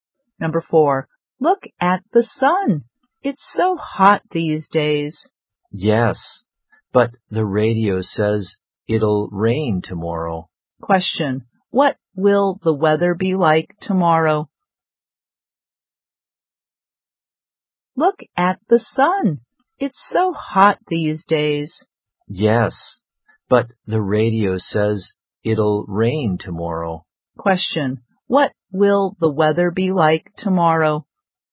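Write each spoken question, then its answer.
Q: Question, what will the weather be like tomorrow?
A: Rainy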